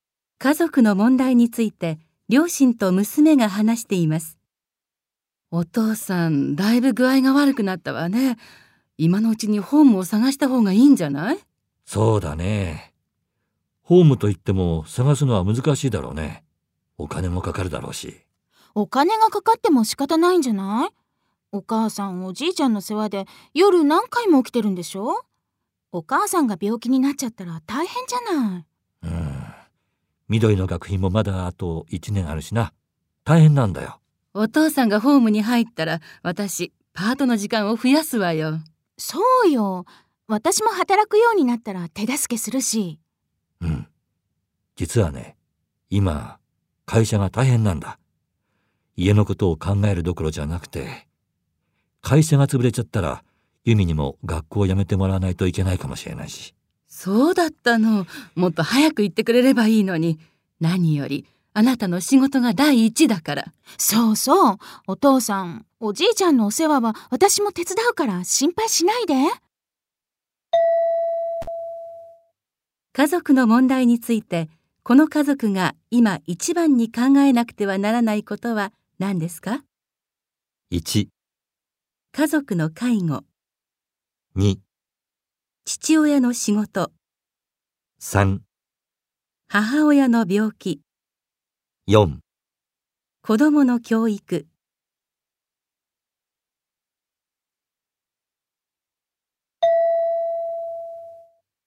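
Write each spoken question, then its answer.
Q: 家族の問題について、この家族が今一番に考えなくてはならないことは何ですか?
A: 2: 父親の仕事。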